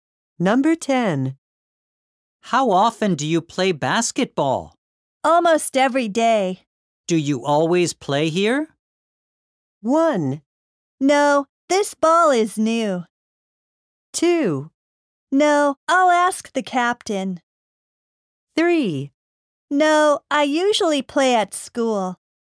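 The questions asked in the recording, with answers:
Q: Do you always play here?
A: 3: No, I usually play at school.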